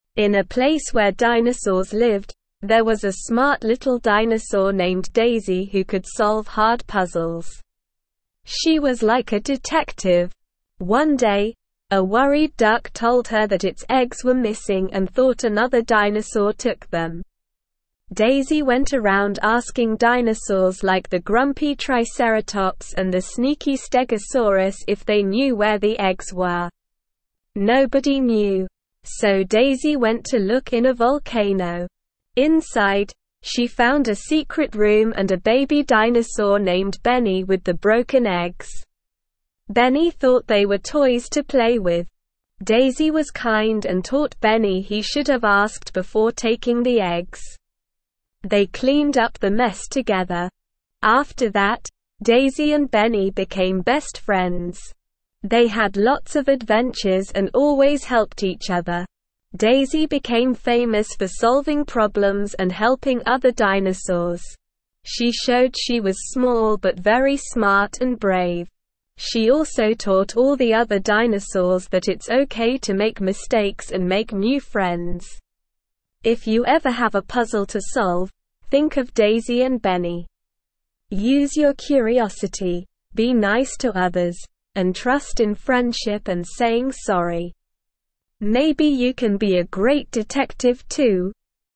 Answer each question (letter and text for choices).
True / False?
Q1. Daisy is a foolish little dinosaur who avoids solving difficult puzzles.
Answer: False

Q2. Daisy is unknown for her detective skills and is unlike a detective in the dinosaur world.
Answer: False

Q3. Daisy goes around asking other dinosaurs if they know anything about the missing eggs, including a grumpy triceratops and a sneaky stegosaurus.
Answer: True

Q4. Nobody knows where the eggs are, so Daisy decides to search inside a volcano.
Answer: True

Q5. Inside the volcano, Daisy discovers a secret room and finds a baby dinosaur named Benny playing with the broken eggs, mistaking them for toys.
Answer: True

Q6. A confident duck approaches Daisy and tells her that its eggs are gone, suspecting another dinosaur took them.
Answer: False

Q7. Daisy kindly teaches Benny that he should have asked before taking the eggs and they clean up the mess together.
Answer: True

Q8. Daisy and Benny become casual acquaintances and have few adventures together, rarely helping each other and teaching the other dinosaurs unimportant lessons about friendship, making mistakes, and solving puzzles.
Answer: False

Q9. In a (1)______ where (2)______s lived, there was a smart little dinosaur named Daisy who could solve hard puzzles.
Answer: place

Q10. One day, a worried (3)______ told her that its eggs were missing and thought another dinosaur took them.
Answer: duck

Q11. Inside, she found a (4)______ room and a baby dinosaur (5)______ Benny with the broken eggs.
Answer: secret

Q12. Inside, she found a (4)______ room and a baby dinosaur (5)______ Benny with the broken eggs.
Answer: named

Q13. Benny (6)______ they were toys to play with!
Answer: thought

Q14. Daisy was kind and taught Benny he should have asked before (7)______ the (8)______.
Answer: taking

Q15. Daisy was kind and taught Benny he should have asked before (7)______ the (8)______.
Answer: eggs

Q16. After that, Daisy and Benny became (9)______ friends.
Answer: best

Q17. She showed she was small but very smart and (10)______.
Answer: brave

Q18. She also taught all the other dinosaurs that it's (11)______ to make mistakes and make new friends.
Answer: okay

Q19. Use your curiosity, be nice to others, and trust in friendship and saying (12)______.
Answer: sorry

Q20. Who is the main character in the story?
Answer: Daisy is the main character in the story.

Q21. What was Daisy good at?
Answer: Daisy was good at solving puzzles and being a detective.

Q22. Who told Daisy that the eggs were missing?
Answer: A worried duck told Daisy that the eggs were missing.

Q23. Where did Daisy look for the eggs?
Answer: Daisy looked for the eggs inside a volcano.

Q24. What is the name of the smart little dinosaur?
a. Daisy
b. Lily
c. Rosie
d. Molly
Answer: a. Daisy

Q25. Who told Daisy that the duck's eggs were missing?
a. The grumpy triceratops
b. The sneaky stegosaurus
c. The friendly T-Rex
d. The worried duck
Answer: d. The worried duck

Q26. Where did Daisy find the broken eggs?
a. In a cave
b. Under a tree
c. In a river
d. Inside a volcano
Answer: d. Inside a volcano

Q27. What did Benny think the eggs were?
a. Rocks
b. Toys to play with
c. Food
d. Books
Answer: b. Toys to play with

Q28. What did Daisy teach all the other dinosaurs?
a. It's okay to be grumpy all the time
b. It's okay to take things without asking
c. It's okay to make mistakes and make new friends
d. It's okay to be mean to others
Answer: c. It's okay to make mistakes and make new friends

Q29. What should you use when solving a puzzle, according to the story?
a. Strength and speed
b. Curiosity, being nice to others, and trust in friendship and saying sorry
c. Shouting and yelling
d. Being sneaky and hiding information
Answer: b. Curiosity, being nice to others, and trust in friendship and saying sorry

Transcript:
In a place where dinosaurs lived, there was a smart little dinosaur named Daisy who could solve hard puzzles. She was like a detective! One day, a worried duck told her that its eggs were missing and thought another dinosaur took them.
Daisy went around asking dinosaurs like the grumpy triceratops and the sneaky stegosaurus if they knew where the eggs were. Nobody knew. So Daisy went to look in a volcano. Inside, she found a secret room and a baby dinosaur named Benny with the broken eggs. Benny thought they were toys to play with!
Daisy was kind and taught Benny he should have asked before taking the eggs. They cleaned up the mess together. After that, Daisy and Benny became best friends. They had lots of adventures and always helped each other.
Daisy became famous for solving problems and helping other dinosaurs. She showed she was small but very smart and brave. She also taught all the other dinosaurs that it's okay to make mistakes and make new friends.
If you ever have a puzzle to solve, think of Daisy and Benny. Use your curiosity, be nice to others, and trust in friendship and saying sorry. Maybe you can be a great detective too!

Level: Level 2